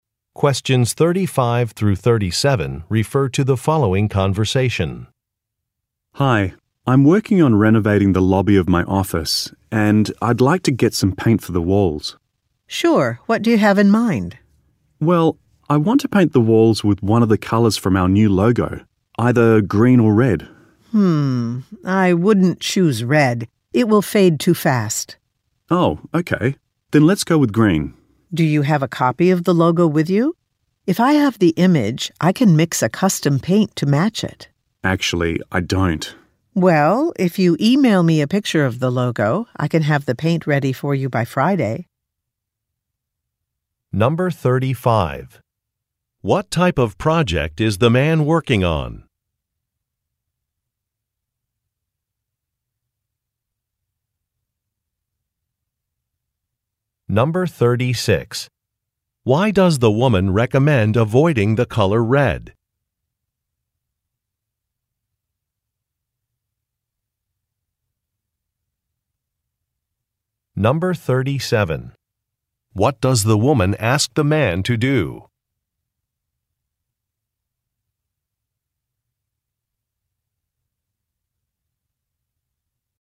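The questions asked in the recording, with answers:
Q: What type of project is the man working on?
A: Renovating the lobby of his office

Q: Why does the woman recommend avoiding the color red?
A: It will fade too fast

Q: What does the woman ask the man to do?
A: Email her a picture of the logo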